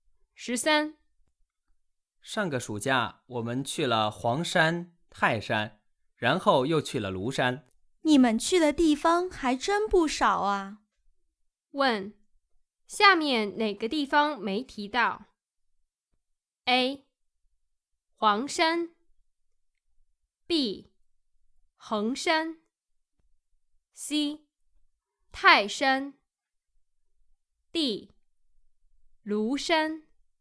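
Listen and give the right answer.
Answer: B: 衡山。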